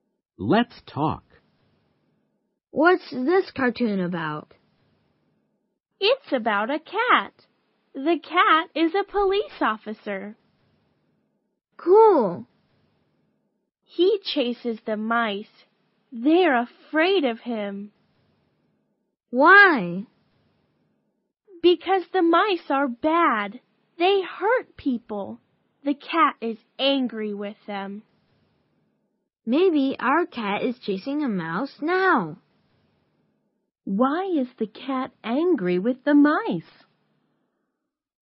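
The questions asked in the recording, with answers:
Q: Why is the cat angry with the mice?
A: Because the mice are bad; they hurt people.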